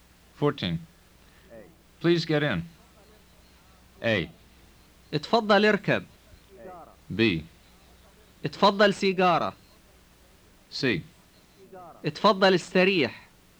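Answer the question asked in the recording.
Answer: A: اتفضل اركب.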